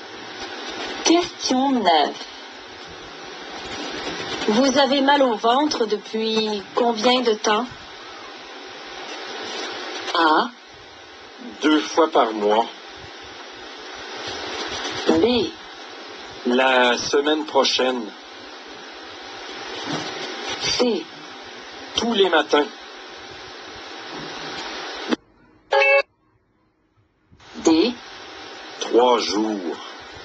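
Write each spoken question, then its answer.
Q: Vous avez mal au ventre depuis combien de temps?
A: D: Trois jours.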